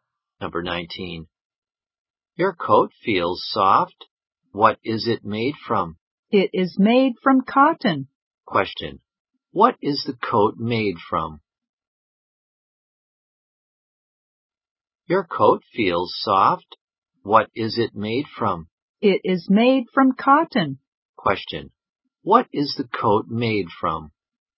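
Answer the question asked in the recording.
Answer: Cotton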